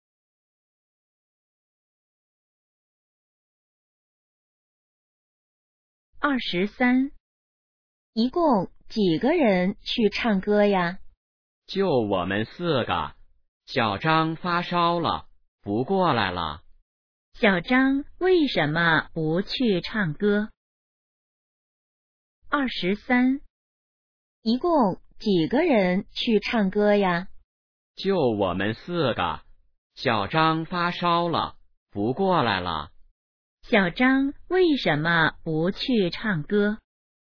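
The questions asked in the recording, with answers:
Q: 小张为什么不去唱歌?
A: 发烧了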